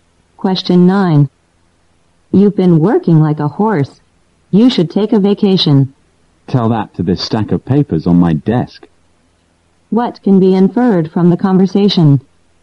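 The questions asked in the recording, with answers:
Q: What can be inferred from the conversation?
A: The speaker has too much work to take a vacation.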